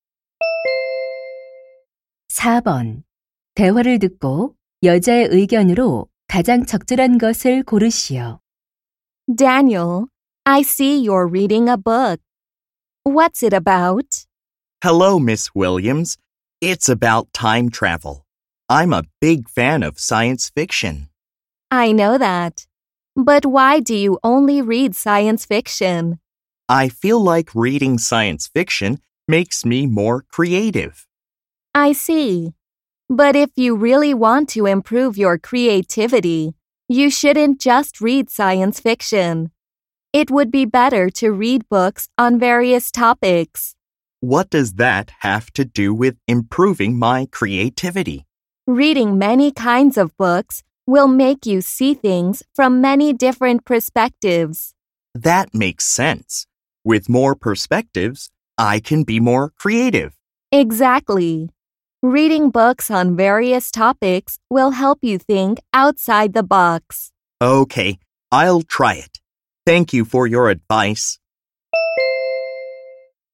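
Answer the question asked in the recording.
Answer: 다양한 주제의 책을 읽는 것이 창의력 향상에 도움이 된다.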